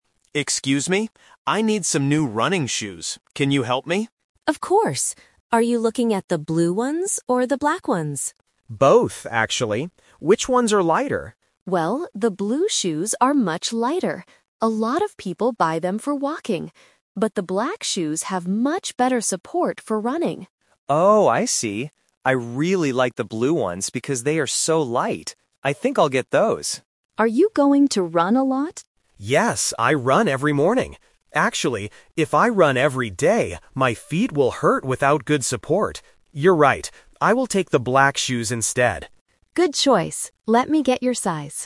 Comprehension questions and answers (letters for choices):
Listen to the conversation and choose the correct answer (A, B, or C).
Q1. What does the clerk say about the blue shoes?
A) They have great support.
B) They are much lighter.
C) They are very expensive.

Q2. Why are the black shoes good?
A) They are good for walking.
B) They have better support for running.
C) They are easy to clean.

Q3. Which shoes does the customer buy in the end?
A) The blue shoes, because they are light.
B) The black shoes, because he runs every day.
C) He decides to buy both pairs of shoes.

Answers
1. B
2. B
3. B

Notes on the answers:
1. The customer asks which shoes are lighter, and the clerk answers, "the blue shoes are much lighter." Option A is a trap because having great support is a feature of the black shoes. Option C is a plausible guess for shopping, but the price is not mentioned in the audio.
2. The clerk clearly says that the black shoes "have much better support for running." Option A is a trap because the blue shoes are the ones people buy for walking. Option C is plausible for black shoes, but it is never mentioned.
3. This question uses the "Twist" technique. The customer initially wants the blue shoes because they are light. However, when he remembers that he runs every morning, he changes his mind and buys the black shoes for better support. Option A is the main trap (his original plan). Option C is incorrect.

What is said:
Customer: Excuse me, I need some new running shoes. Can you help me?
Clerk: Of course! Are you looking at the blue ones or the black ones?
Customer: Both, actually. Which ones are lighter?
Clerk: Well, the blue shoes are much lighter. A lot of people buy them for walking. But the black shoes have much better support for running.
Customer: Oh, I see. I really like the blue ones because they are so light. I think I'll get those.
Clerk: Are you going to run a lot?
Customer: Yes, I run every morning. Actually... if I run every day, my feet will hurt without good support. You're right. I will take the black shoes instead.